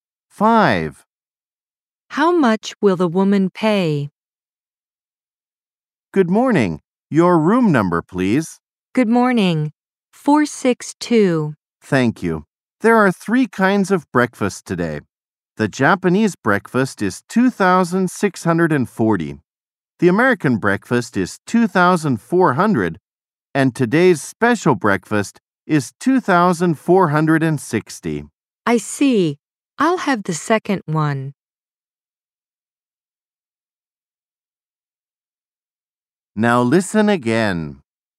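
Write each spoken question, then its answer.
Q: How much will the woman pay?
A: 2,400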